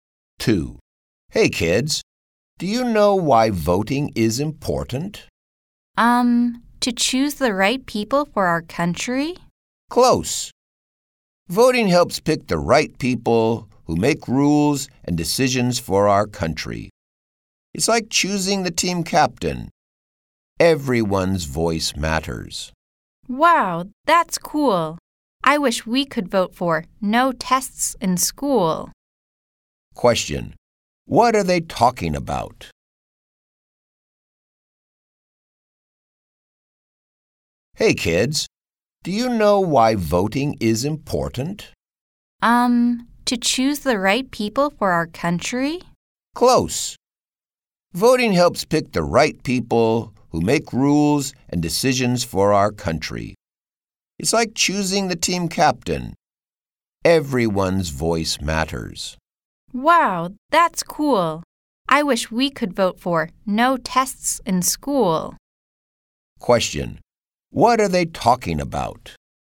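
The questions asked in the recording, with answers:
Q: What are they talking about?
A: Why voting is important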